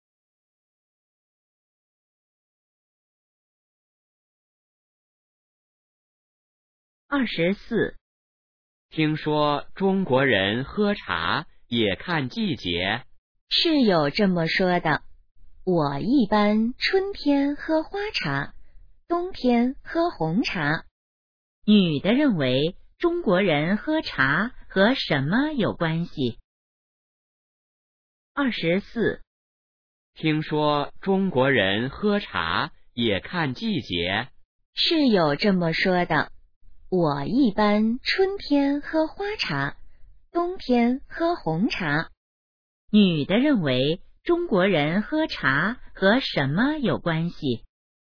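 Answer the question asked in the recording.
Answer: 季节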